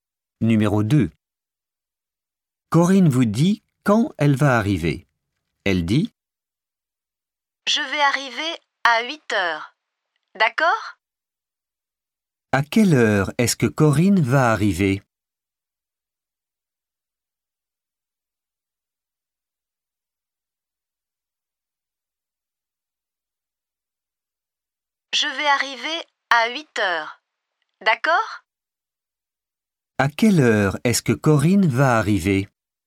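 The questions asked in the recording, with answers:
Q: À quelle heure est-ce que Corinne va arriver ?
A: À 8 heures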